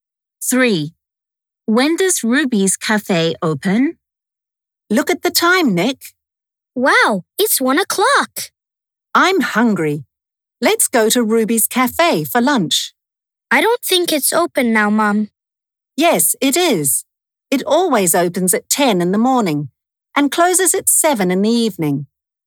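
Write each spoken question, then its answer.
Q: When does Ruby's cafe open?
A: at 10 in the morning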